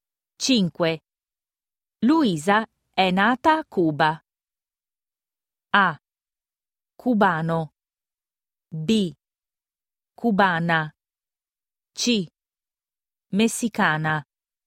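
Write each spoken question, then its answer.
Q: Luisa è nata a Cuba.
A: B: Cubana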